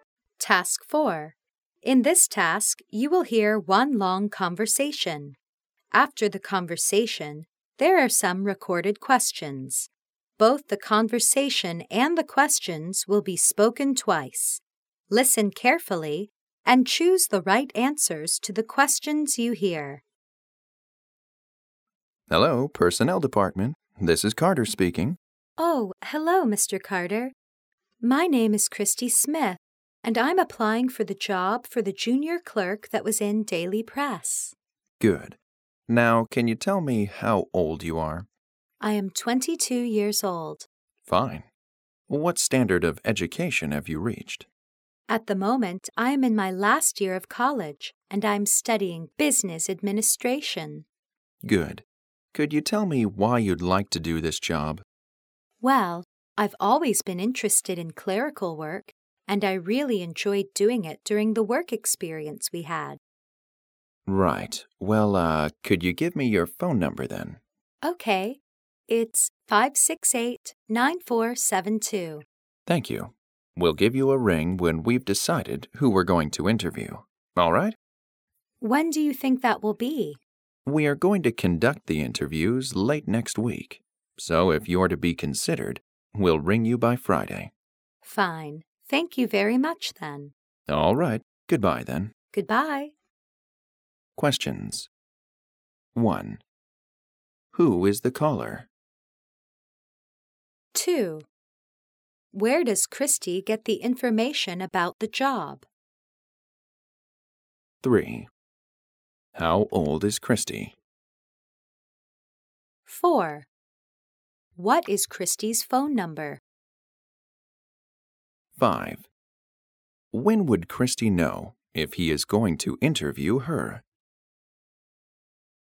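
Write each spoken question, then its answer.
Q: Who is the caller?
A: Christy Smith, a job applicant

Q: Where does Christy get the information about the job?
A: From the Daily Press

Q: How old is Christy?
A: 22 years old

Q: What is Christy's phone number?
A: 568-9472

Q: When would Christy know if he is going to interview her?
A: By Friday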